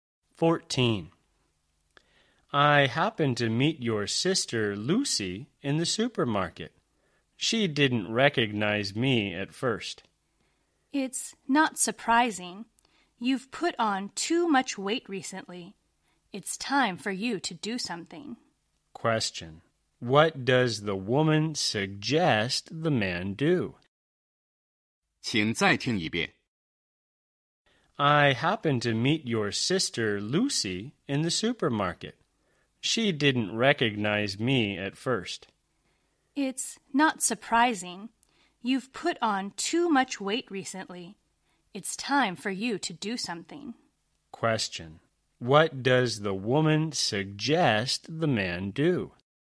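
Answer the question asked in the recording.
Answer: Lose weight / take exercise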